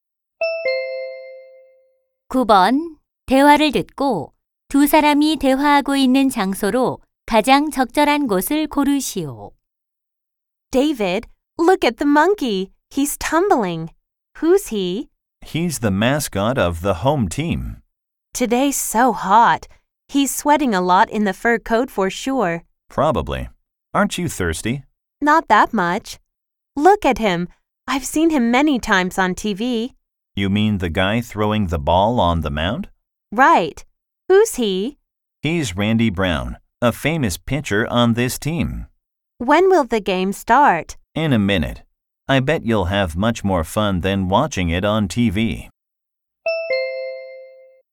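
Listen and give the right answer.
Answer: 야구장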